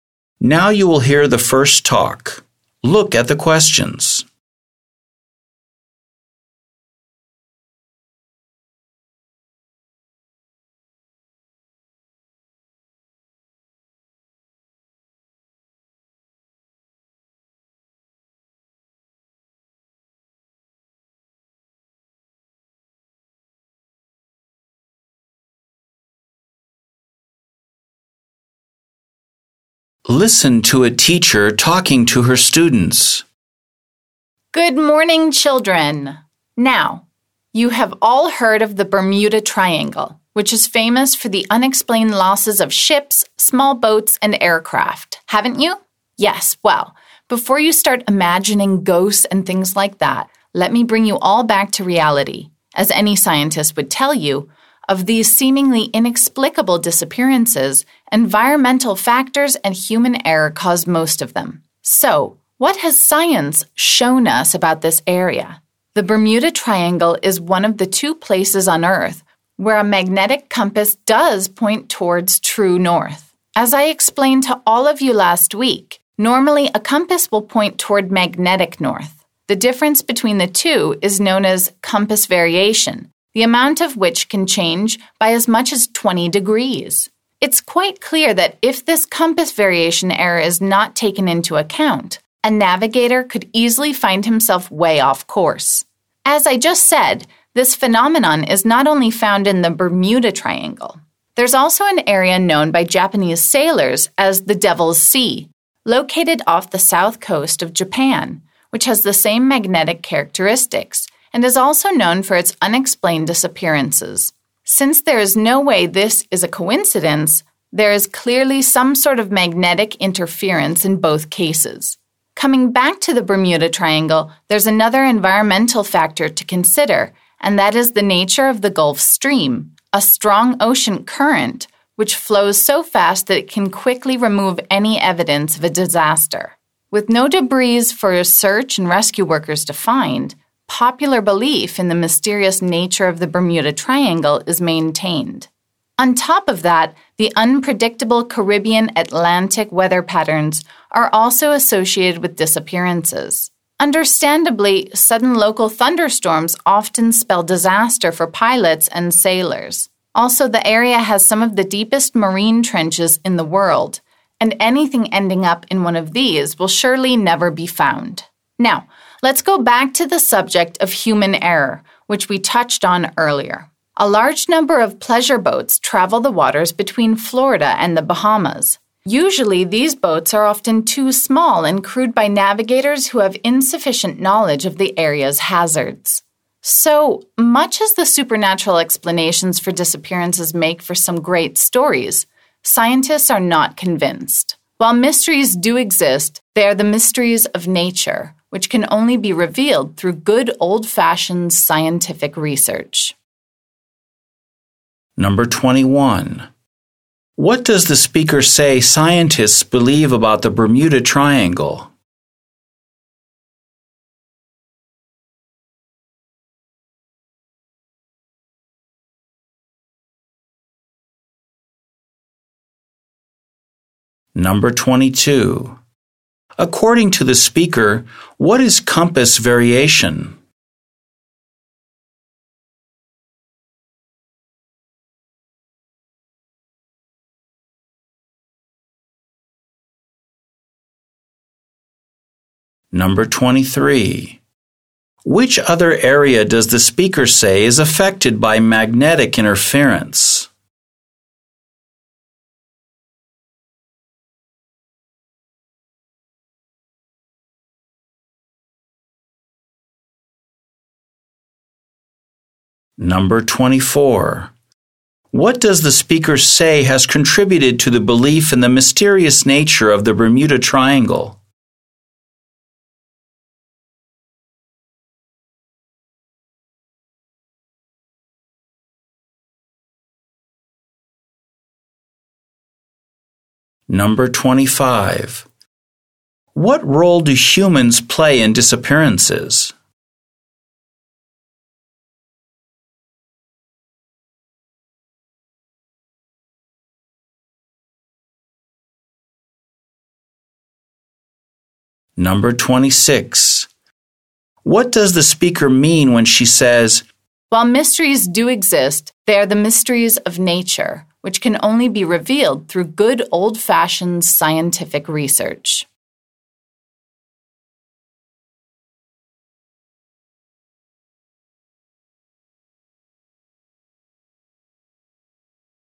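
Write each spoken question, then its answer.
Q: What does the speaker say scientists believe about the Bermuda Triangle?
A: Most disappearances were caused by environmental factors and human error

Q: According to the speaker, what is compass variation?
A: The difference between true north and magnetic north

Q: Which other area does the speaker say is affected by magnetic interference?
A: The Devil's Sea, off the south coast of Japan

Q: What does the speaker say has contributed to the belief in the mysterious nature of the Bermuda Triangle?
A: The fast Gulf Stream removes debris, so no evidence is found

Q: What role do humans play in disappearances?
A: Small boats are crewed by navigators who don't know the area's hazards

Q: What does the speaker mean when she says,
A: The disappearances have natural explanations that science can reveal, not supernatural ones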